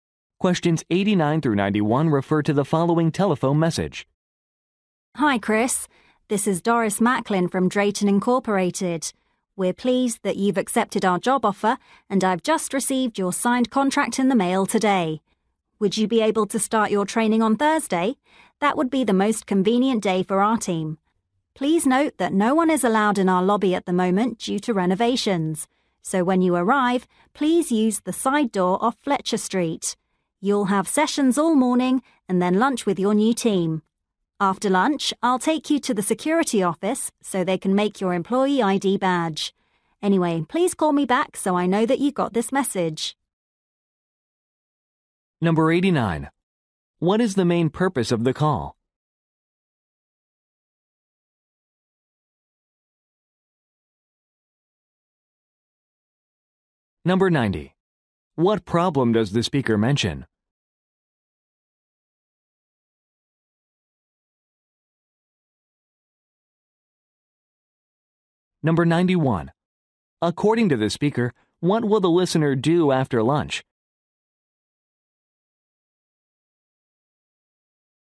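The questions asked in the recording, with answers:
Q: What is the main purpose of the call?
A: To arrange the new employee's training

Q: What problem does the speaker mention?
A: The lobby is closed for renovations

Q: According to the speaker, what will the listener do after lunch?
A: Get an employee ID badge made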